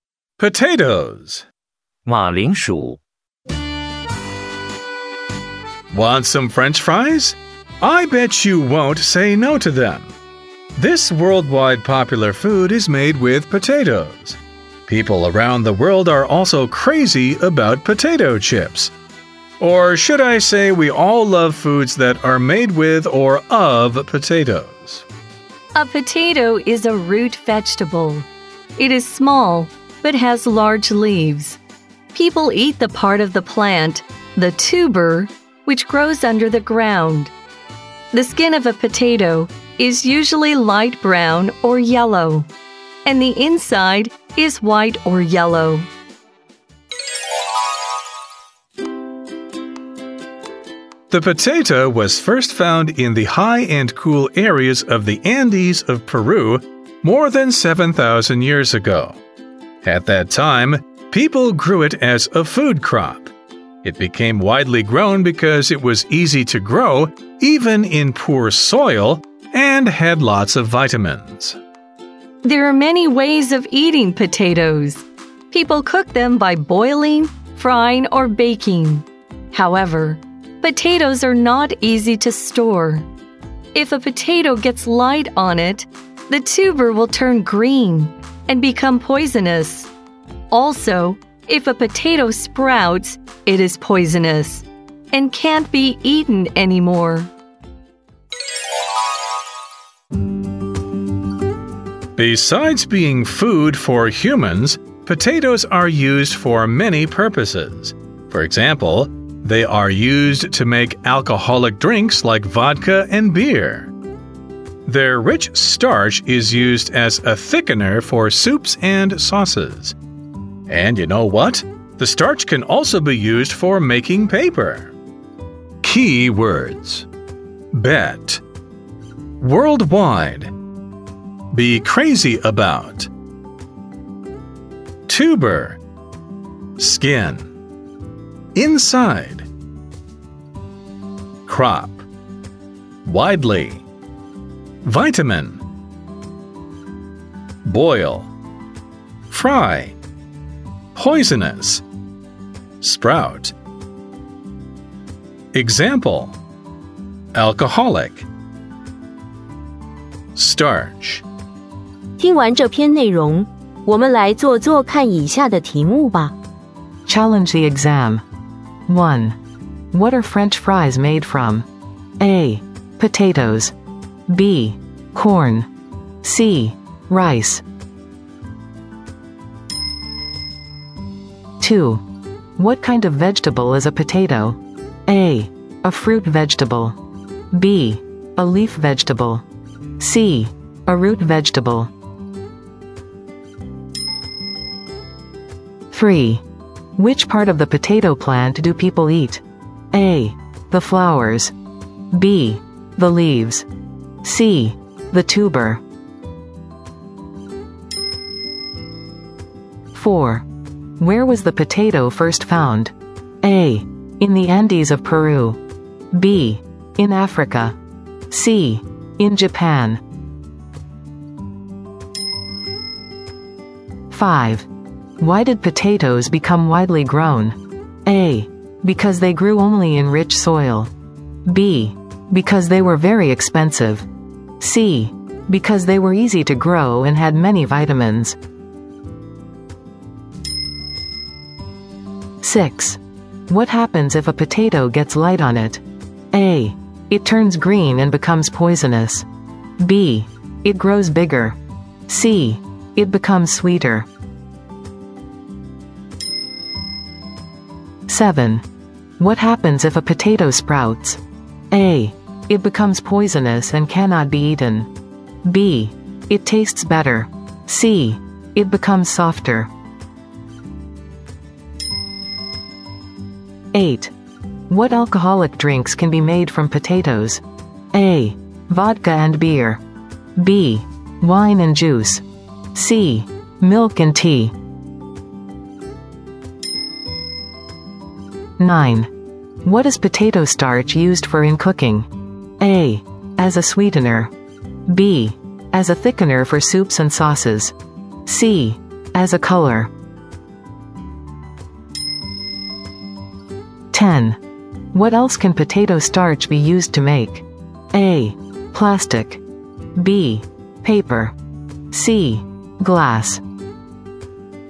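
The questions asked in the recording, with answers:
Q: What are French fries made from?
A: A: Potatoes.

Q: What kind of vegetable is a potato?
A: C: A root vegetable.

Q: Which part of the potato plant do people eat?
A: C: The tuber.

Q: Where was the potato first found?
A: A: In the Andes of Peru.

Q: Why did potatoes become widely grown?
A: C: Because they were easy to grow and had many vitamins.

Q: What happens if a potato gets light on it?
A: A: It turns green and becomes poisonous.

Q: What happens if a potato sprouts?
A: A: It becomes poisonous and cannot be eaten.

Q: What alcoholic drinks can be made from potatoes?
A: A: Vodka and beer.

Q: What is potato starch used for in cooking?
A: B: As a thickener for soups and sauces.

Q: What else can potato starch be used to make?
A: B: Paper.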